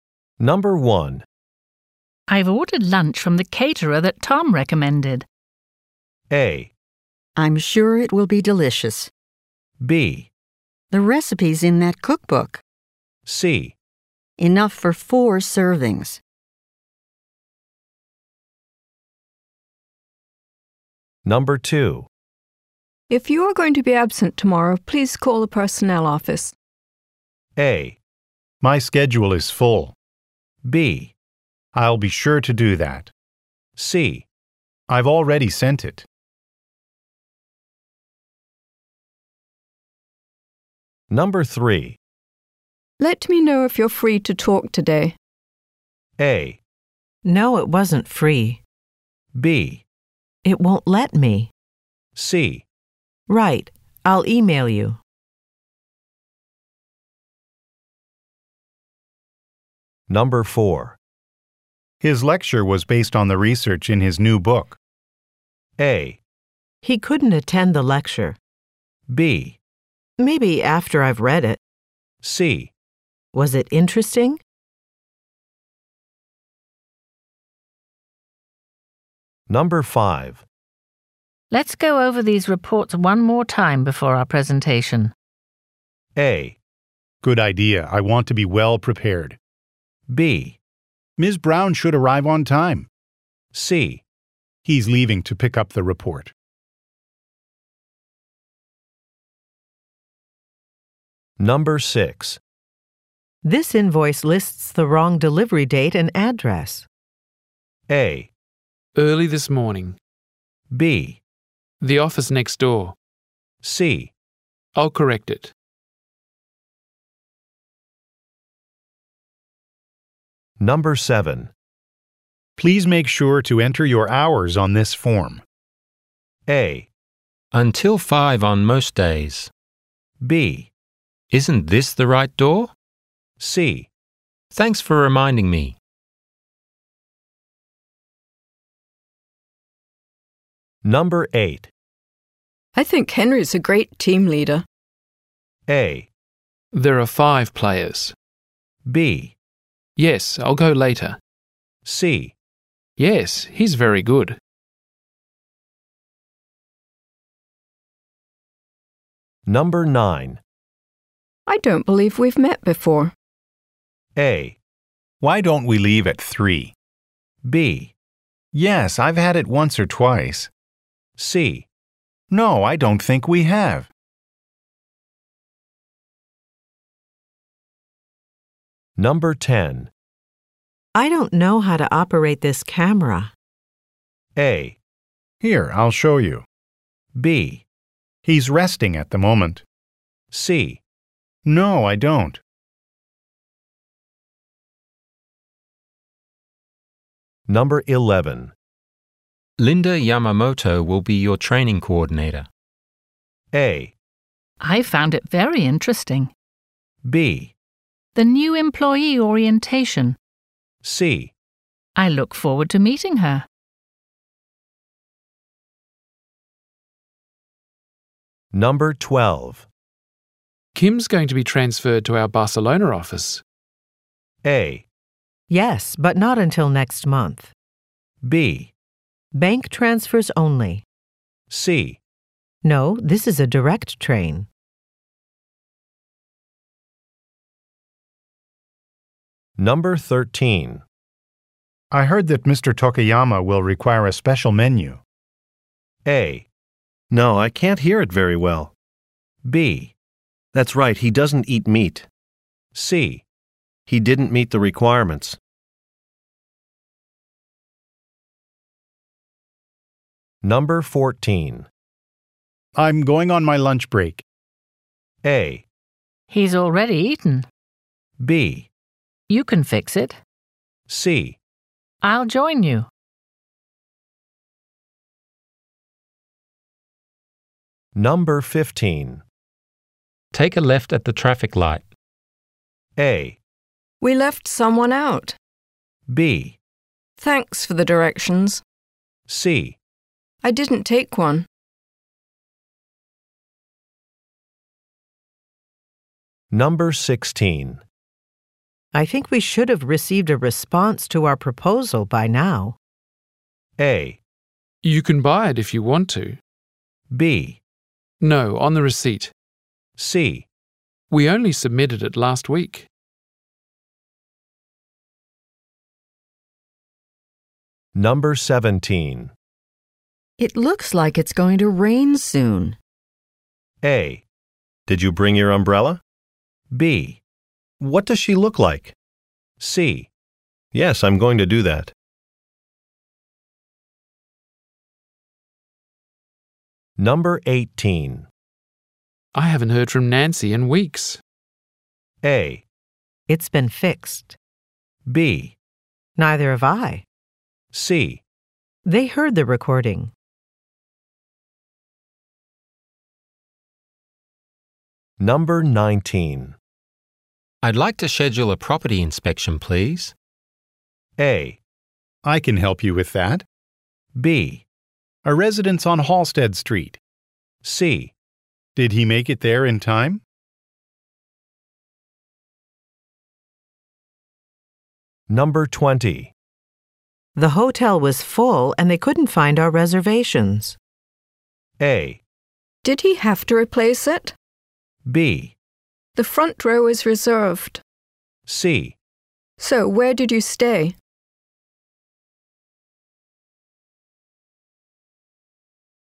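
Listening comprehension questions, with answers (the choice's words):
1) I've ordered lunch from the caterer that Tom recommended.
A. I'm sure it will be delicious.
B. The recipe's in that cookbook.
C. Enough for four servings.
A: I'm sure it will be delicious.

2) If you are going to be absent tomorrow, please call the personnel office.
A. My schedule is full.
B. I'll be sure to do that.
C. I've already sent it.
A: I'll be sure to do that.

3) Let me know if you're free to talk today.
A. No, it wasn't free.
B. It won't let me.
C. Right, I'll e-mail you.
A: Right, I'll e-mail you.

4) His lecture was based on the research in his new book.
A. He couldn't attend the lecture.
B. Maybe after I've read it.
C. Was it interesting?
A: Was it interesting?

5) Let's go over these reports one more time before our presentation.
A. Good idea, I want to be well prepared.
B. Ms. Brown should arrive on time.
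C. He's leaving to pick up the report.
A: Good idea, I want to be well prepared.

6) This invoice lists the wrong delivery date and address.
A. Early this morning.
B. The office next door.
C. I'll correct it.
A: I'll correct it.

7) Please make sure to enter your hours on this form.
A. Until five on most days.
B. Isn't this the right door?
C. Thanks for reminding me.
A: Thanks for reminding me.

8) I think Henry's a great team leader.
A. There are five players.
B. Yes, I'll go later.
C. Yes, he's very good.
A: Yes, he's very good.

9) I don't believe we've met before.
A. Why don't we leave at three?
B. Yes, I've had it once or twice.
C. No, I don't think we have.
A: No, I don't think we have.

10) I don't know how to operate this camera.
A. Here, I'll show you.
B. He's resting at the moment.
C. No, I don't.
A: Here, I'll show you.

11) Linda Yamamoto will be your training coordinator.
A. 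I found it very interesting.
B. The new-employee orientation.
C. I look forward to meeting her.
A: I look forward to meeting her.

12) Kim's going to be transferred to our Barcelona office.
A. Yes, but not until next month.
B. Bank transfers only.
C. No, this is a direct train.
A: Yes, but not until next month.

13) I heard that Mr. Tokayama will require a special menu.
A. No, I can't hear it very well.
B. That's right, he doesn't eat meat.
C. He didn't meet the requirements.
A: That's right, he doesn't eat meat.

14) I'm going on my lunch break.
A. He's already eaten.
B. You can fix it.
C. I'll join you.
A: I'll join you.

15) Take a left at the traffic light.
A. We left someone out.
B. Thanks for the directions.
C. I didn't take one.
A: Thanks for the directions.

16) I think we should have received a response to our proposal by now.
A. You can buy it if you want to.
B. No, on the receipt.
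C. We only submitted it last week.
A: We only submitted it last week.

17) It looks like it's going to rain soon.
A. Did you bring your umbrella?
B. What does she look like?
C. Yes, I'm going to do that.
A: Did you bring your umbrella?

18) I haven't heard from Nancy in weeks.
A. It's been fixed.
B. Neither have I.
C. They heard the recording.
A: Neither have I.

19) I'd like to schedule a property inspection, please.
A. I can help you with that.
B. A residence on Halsted Street.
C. Did he make it there in time?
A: I can help you with that.

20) The hotel was full and they couldn't find our reservations.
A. Did he have to replace it?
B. The front row is reserved.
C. So where did you stay?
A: So where did you stay?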